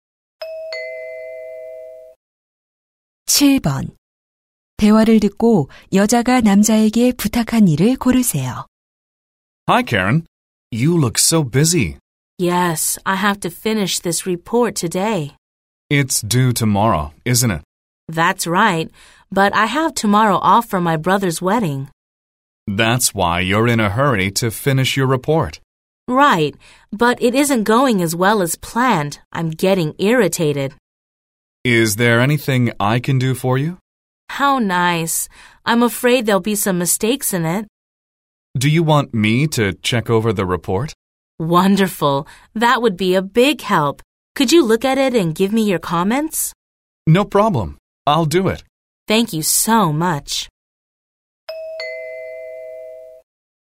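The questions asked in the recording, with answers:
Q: 대화를 듣고 여자가 남자에게 부탁한 일을 고르세요.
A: 보고서 검토해 주기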